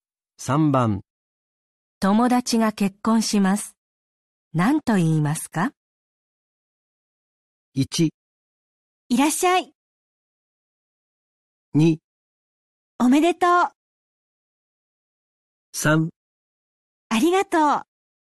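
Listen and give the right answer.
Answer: 2: おめでとう。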